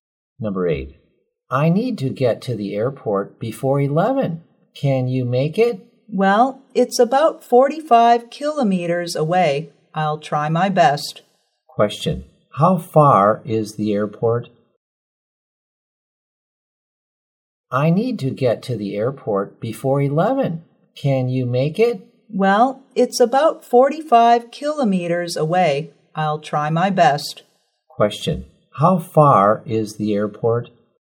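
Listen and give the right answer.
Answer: About 45 kilometers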